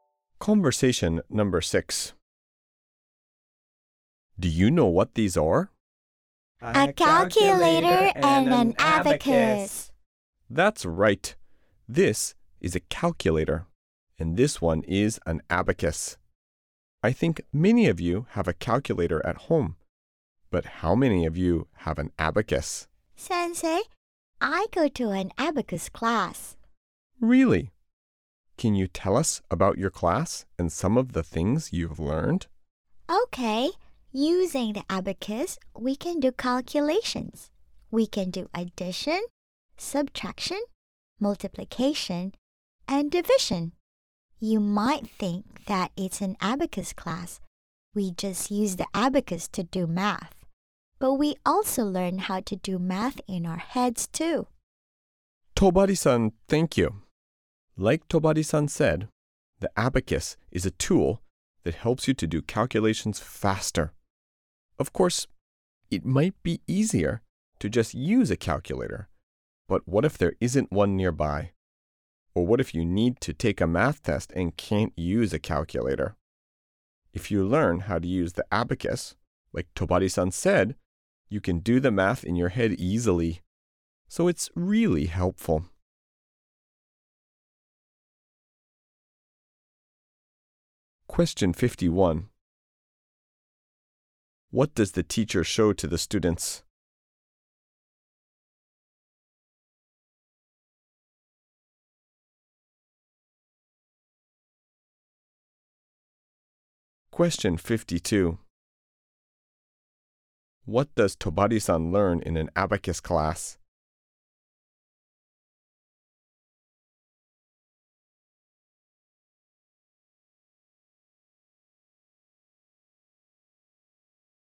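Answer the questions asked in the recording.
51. A calculator and an abacus
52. How to do calculations with the abacus and how to do math in her head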